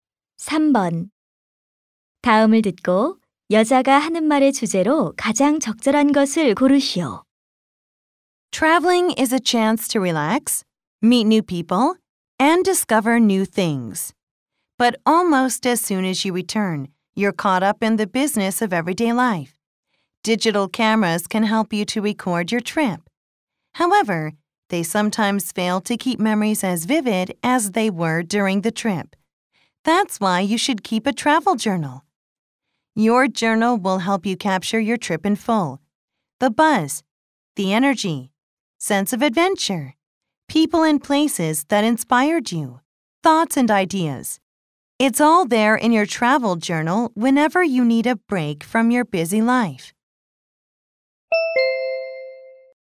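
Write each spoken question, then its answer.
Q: 다음을 듣고 여자가 하는 말의 주제로 가장 적절한 것을 고르시오.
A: 여행 일지를 쓰는 것의 좋은 점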